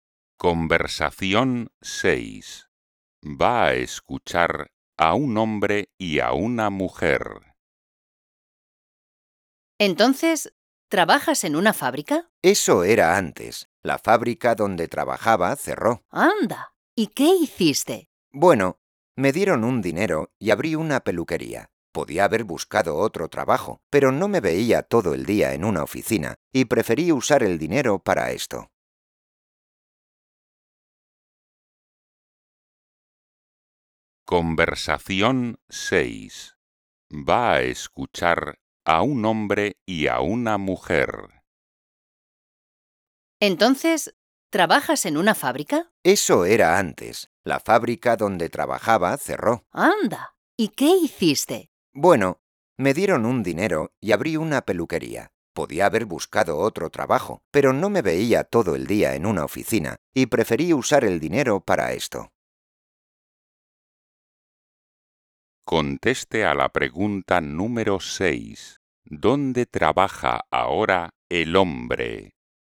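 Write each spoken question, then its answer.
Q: ¿Dónde trabaja ahora el hombre?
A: en una peluquería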